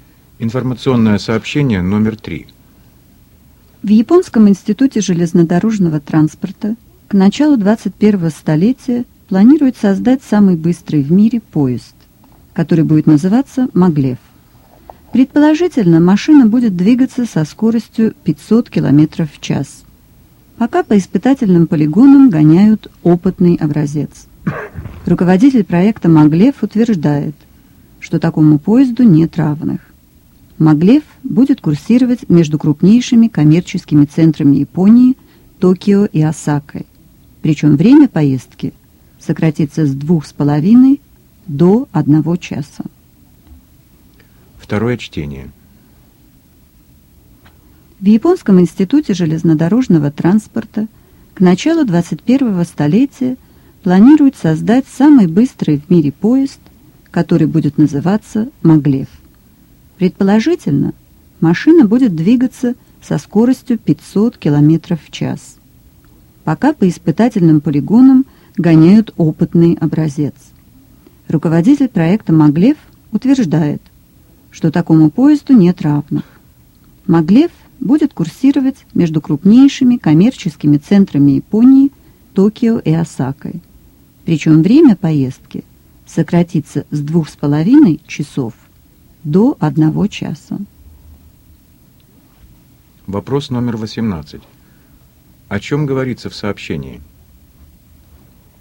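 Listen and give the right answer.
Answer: О создании в Японии самого быстрого в мире поезда «Маглев»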